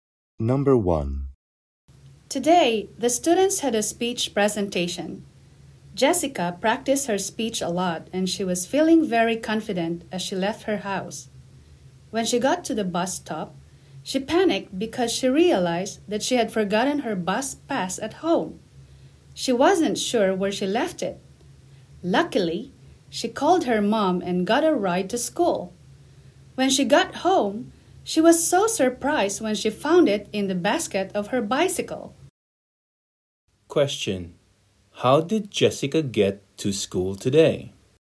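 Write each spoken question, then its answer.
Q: Question: how did Jessica get to school today?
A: Her mom drove her (by car)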